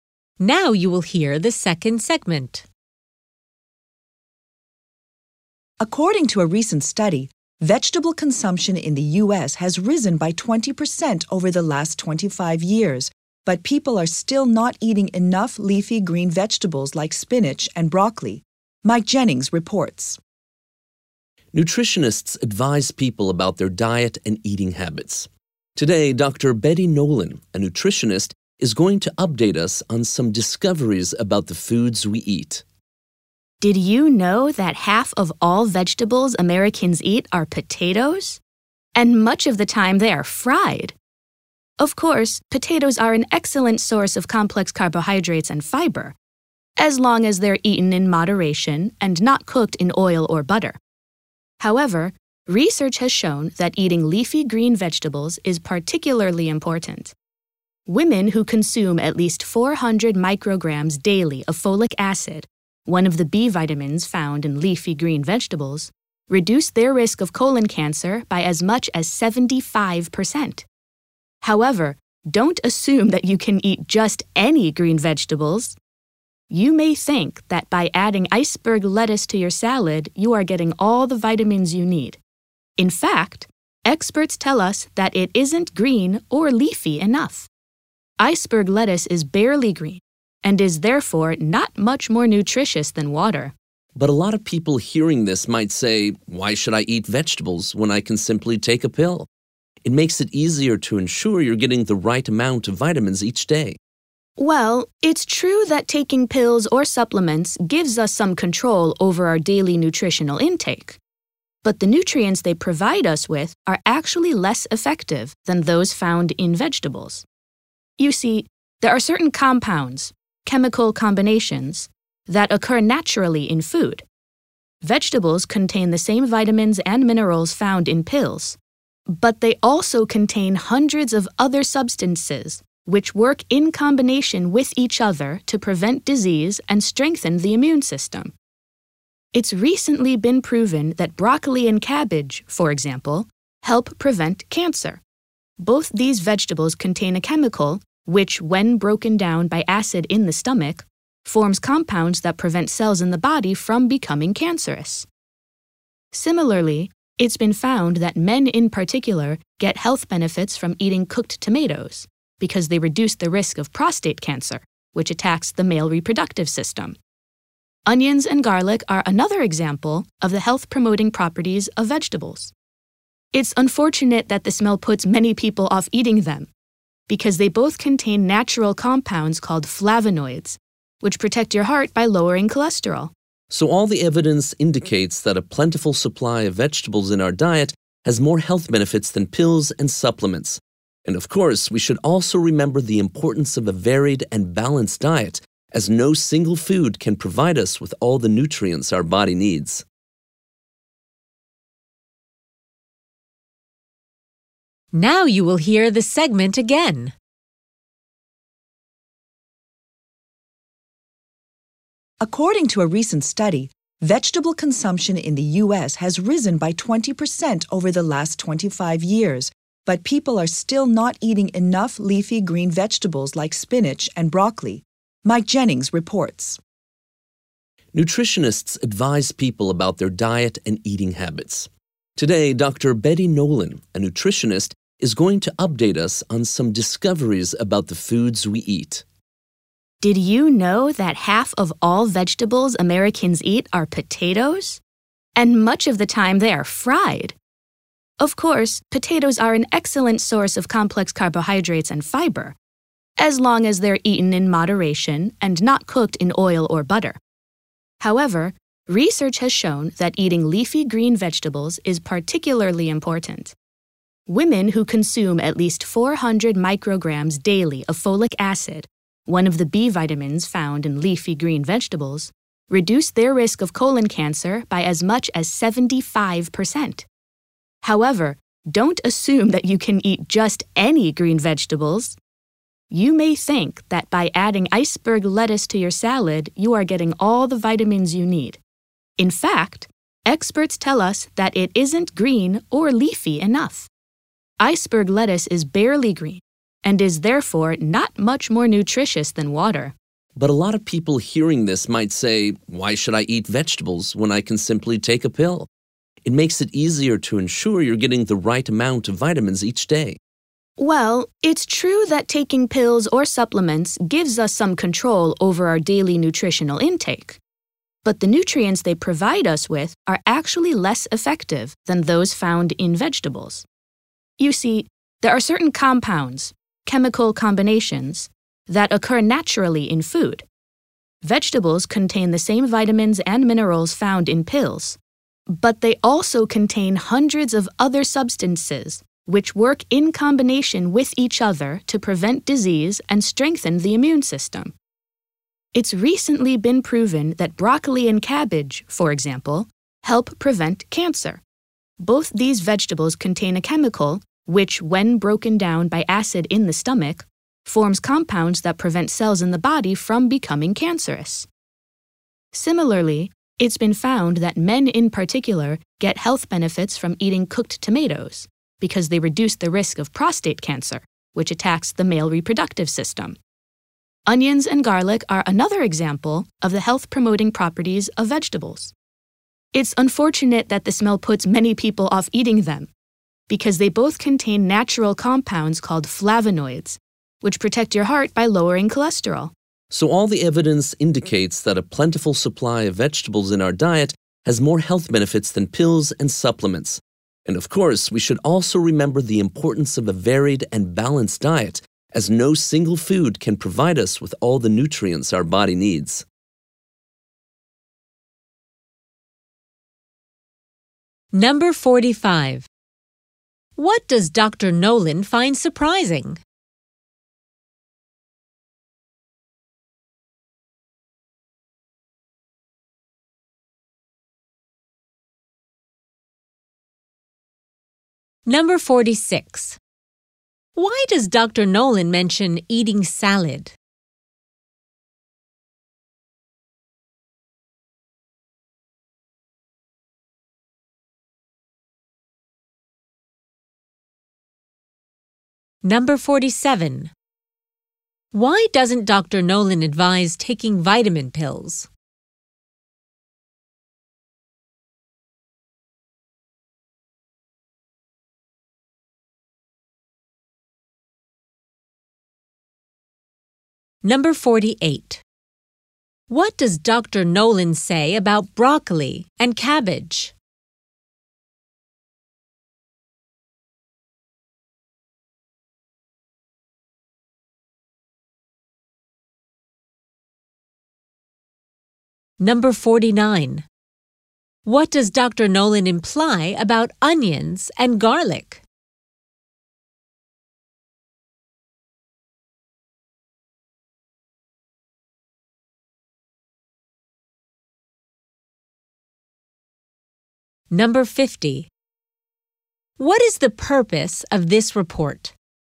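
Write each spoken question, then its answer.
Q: Why does Dr. Nolan mention eating salad?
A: To point out that iceberg lettuce is not green or leafy enough to be nutritious

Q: Nolan advise taking vitamin pills?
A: Their nutrients are less effective than those in vegetables

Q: What does Dr. Nolan say about broccoli and cabbage?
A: They help prevent cancer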